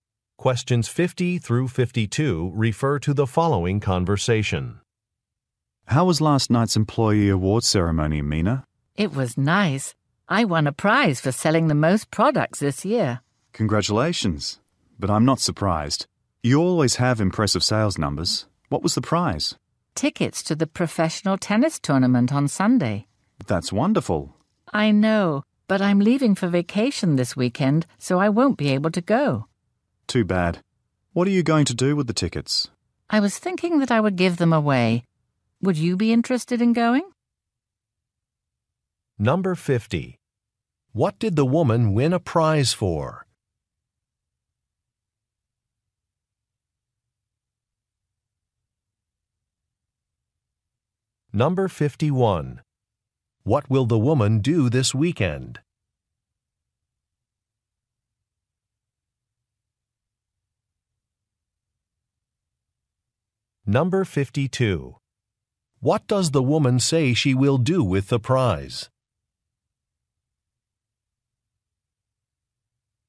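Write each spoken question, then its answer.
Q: What did the woman win a prize for?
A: Selling the most products this year

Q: What will the woman do this weekend?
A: Leave for vacation

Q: What does the woman say she will do with the prize?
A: Give the tickets away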